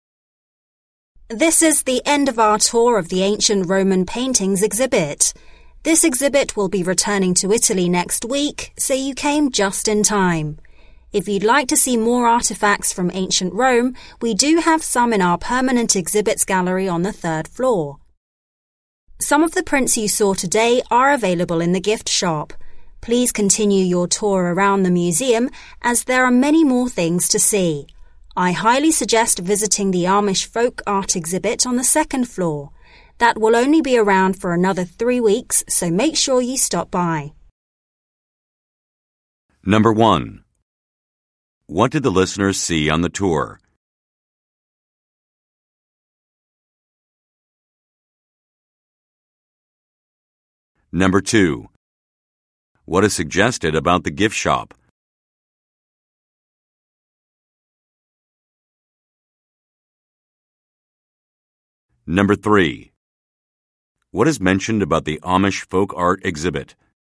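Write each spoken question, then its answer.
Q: What did the listeners see on the tour?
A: Ancient Roman paintings

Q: What is suggested about the gift shop?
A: It sells some of the prints seen on the tour

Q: What is mentioned about the Amish folk art exhibit?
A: It will only be around for another 3 weeks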